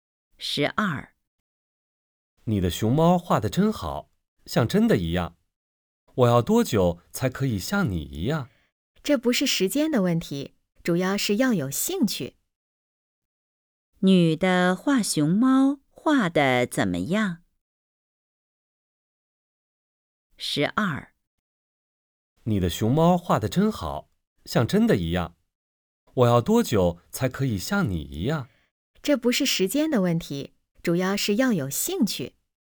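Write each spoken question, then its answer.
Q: 女的画熊猫画得怎么样?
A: 画得很好,像真的一样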